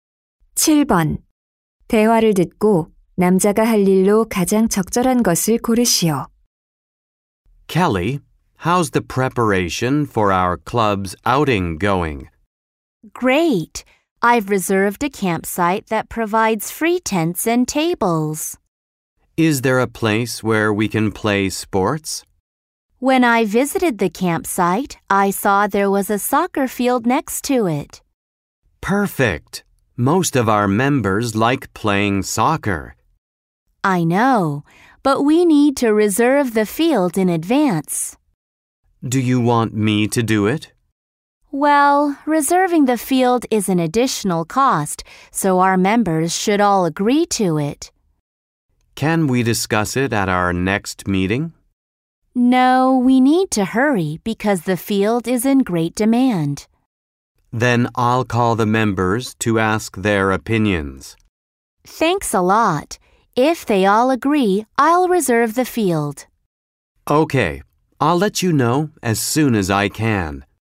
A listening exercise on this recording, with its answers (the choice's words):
7. 대화를 듣고, 남자가 할 일로 가장 적절한 것을 고르시오.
대화를 듣고, 남자가 할 일로 가장 적절한 것을 고르시오.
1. 텐트 대여하기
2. 캠핑장 답사하기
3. 축구장 예약하기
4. 회의 일정 공지하기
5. 회원들에게 전화하기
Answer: 회원들에게 전화하기

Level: 고3